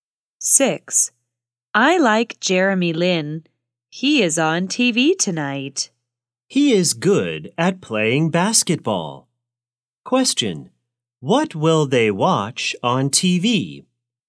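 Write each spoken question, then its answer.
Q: What will they watch on TV?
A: a basketball game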